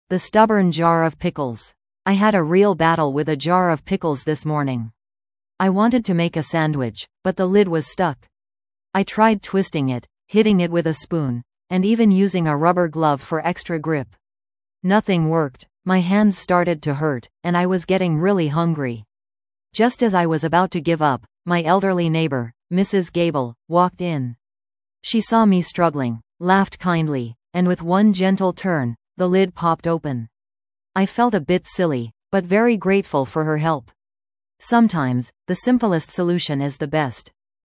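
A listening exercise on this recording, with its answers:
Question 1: What was the speaker trying to open?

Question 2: Who eventually opened the jar for the speaker?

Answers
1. A jar of pickles
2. Mrs. Gable, the elderly neighbor

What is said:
The Stubborn Jar of Pickles
I had a real battle with a jar of pickles this morning. I wanted to make a sandwich, but the lid was stuck! I tried twisting it, hitting it with a spoon, and even using a rubber glove for extra grip. Nothing worked! My hands started to hurt, and I was getting really hungry. Just as I was about to give up, my elderly neighbor, Mrs. Gable, walked in. She saw me struggling, laughed kindly, and with one gentle turn, the lid popped open. I felt a bit silly, but very grateful for her help! Sometimes, the simplest solution is the best.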